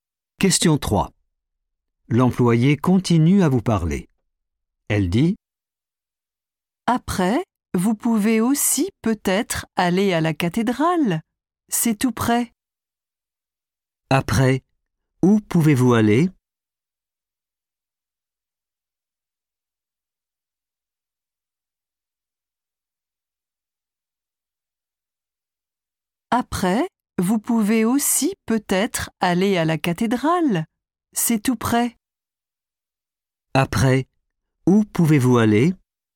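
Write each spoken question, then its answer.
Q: Après, où pouvez-vous aller?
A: à la cathédrale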